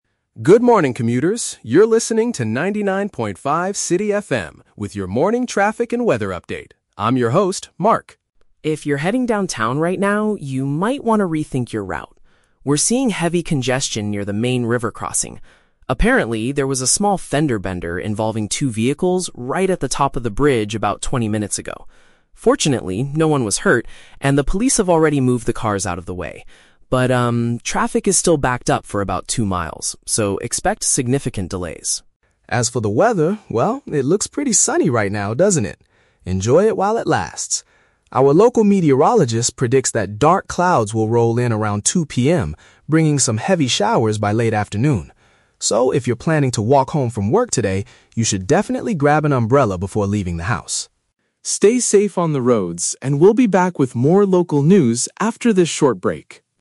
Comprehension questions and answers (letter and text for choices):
Listen to a radio reporter giving an update. Choose the correct answer (A, B, or C) for each question.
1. What caused the current traffic problem?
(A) A minor crash between two cars.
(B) The police closed the road for a security check.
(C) The bridge is being repaired by construction workers.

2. What is the current situation at the river crossing?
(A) The damaged vehicles are still blocking the lanes.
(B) Commuters are completely forbidden from using the route.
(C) Vehicles are moving extremely slowly.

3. What does the reporter say about the weather?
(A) It is currently raining heavily downtown.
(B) People will need rain protection later today.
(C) The sun will shine brightly all afternoon.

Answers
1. (A) A minor crash between two cars.
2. (C) Vehicles are moving extremely slowly.
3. (B) People will need rain protection later today.

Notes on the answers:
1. The reporter says there was a "small fender bender involving two vehicles". Option A paraphrases this perfectly (small fender bender = minor crash). Option B is the Trap: The "police" are mentioned in the audio, but they did not close the road for a security check; they just moved the cars. Option C is a common traffic problem but is not mentioned.
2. The reporter states that "traffic is still backed up for about two miles" and to "expect significant delays". Option C uses synonyms to express this idea (backed up / delays = moving extremely slowly). Option A is the Trap: The cars were in an accident, but the reporter explicitly says the police "moved the cars out of the way", so they are not blocking the lanes anymore. Option B is incorrect because people can still use it, it's just slow.
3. The forecast predicts "heavy showers by late afternoon" and advises listeners to "grab an umbrella". Option B summarizes this advice (umbrella = rain protection; late afternoon = later today). Option A is the Trap: The reporter says "it looks pretty sunny right now", so it is not raining currently. Option C is also a Trap: It is sunny now, but the dark clouds will arrive around 2 PM, so it won't be sunny all afternoon.

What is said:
Reporter: Good morning, commuters! You're listening to 99.5 City FM with your morning traffic and weather update. I'm your host, Mark.
If you're heading downtown right now, you might want to rethink your route. We're seeing heavy congestion near the main river crossing. Apparently, there was a small fender bender involving two vehicles right at the top of the bridge about twenty minutes ago. Fortunately, no one was hurt, and the police have already moved the cars out of the way. But, um, traffic is still backed up for about two miles, so expect significant delays.
As for the weather, well, it looks pretty sunny right now, doesn't it? Enjoy it while it lasts! Our local meteorologist predicts that dark clouds will roll in around 2 PM, bringing some heavy showers by late afternoon. So, if you're planning to walk home from work today, you should definitely grab an umbrella before leaving the house.
Stay safe on the roads, and we'll be back with more local news after this short break.